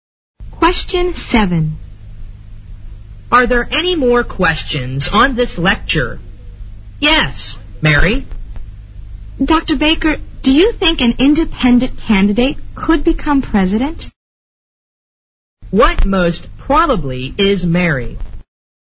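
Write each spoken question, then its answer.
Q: What most probably is Mary?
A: A student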